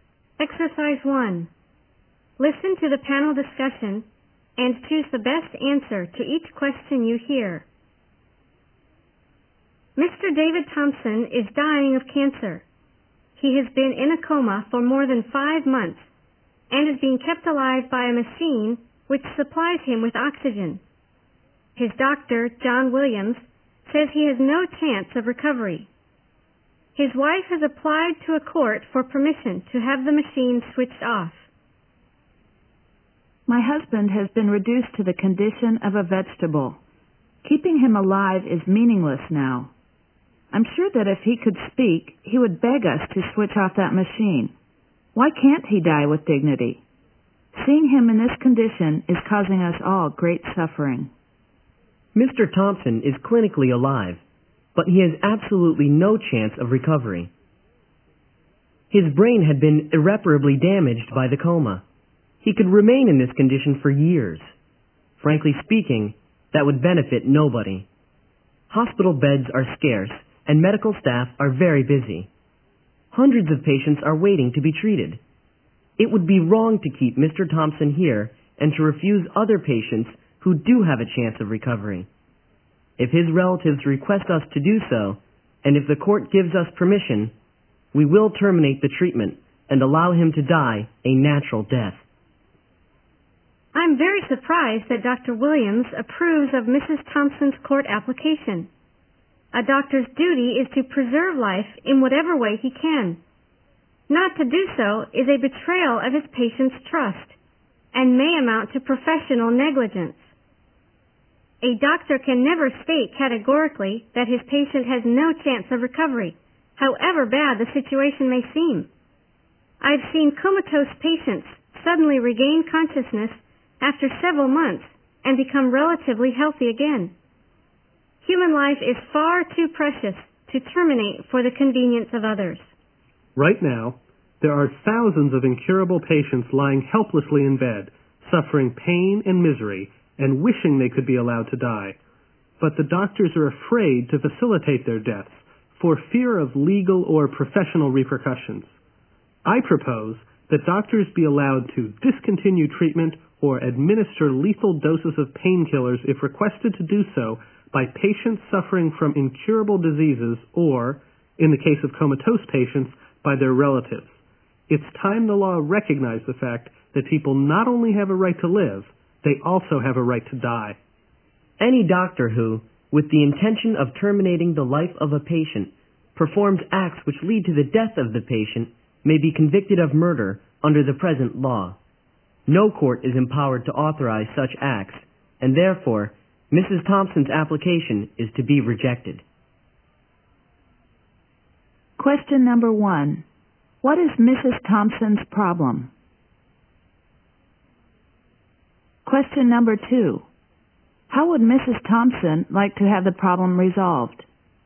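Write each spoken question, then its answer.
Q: What is Mrs. Thompson's problem?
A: Her husband is in an irreversible coma, kept alive by a machine

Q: How would Mrs. Thompson like to have the problem resolved?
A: By having the machine switched off so he can die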